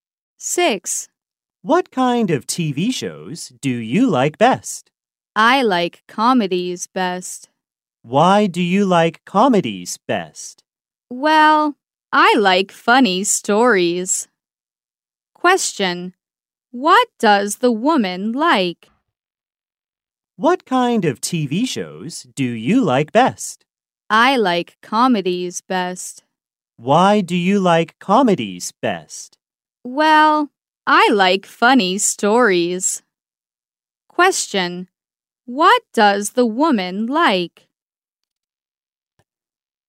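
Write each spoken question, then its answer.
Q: What does the woman like?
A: Comedies (funny stories)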